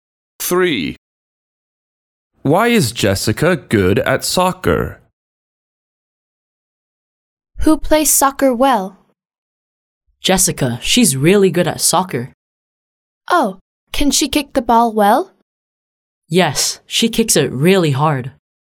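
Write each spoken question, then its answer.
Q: Why is Jessica good at soccer?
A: She kicks the ball really hard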